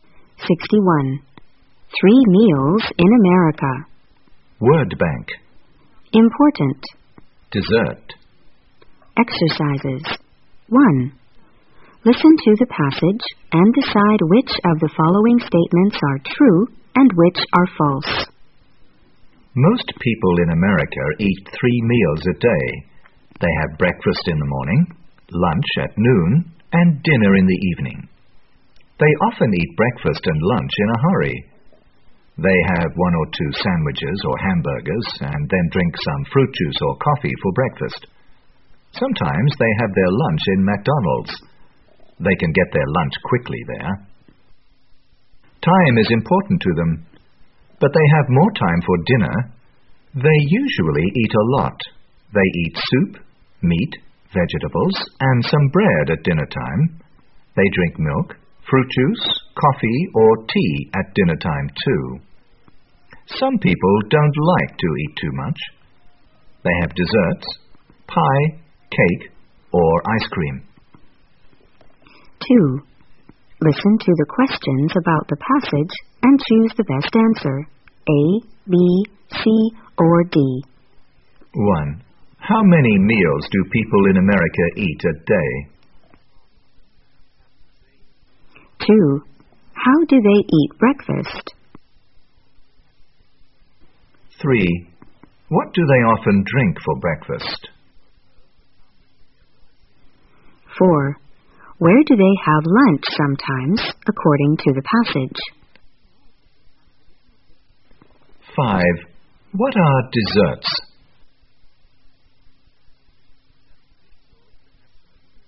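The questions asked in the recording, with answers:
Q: How many meals do people in America eat a day?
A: Three

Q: How do they eat breakfast?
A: In a hurry

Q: What do they often drink for breakfast?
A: Fruit juice or coffee

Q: Where do they have lunch sometimes, according to the passage?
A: In McDonald's

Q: What are desserts?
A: Pie, cake, or ice cream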